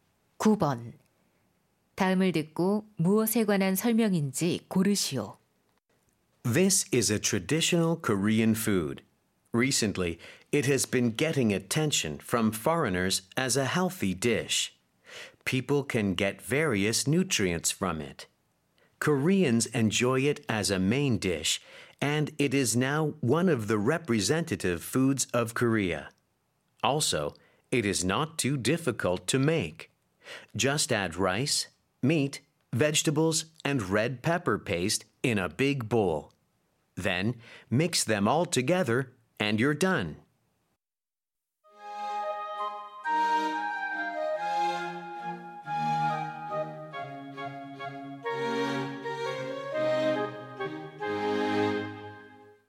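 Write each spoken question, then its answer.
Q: 다음을 듣고 무엇에 관한 설명인지 고르시오.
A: 비빔밥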